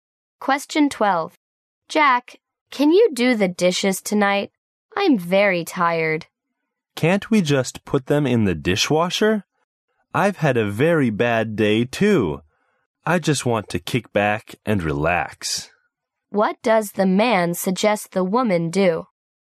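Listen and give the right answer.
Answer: Put the dishes in the dishwasher.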